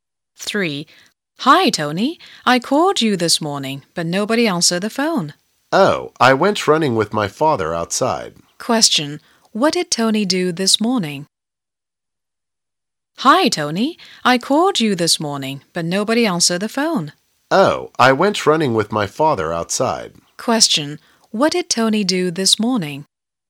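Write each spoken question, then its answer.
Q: What did Tony do this morning?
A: He went running with his father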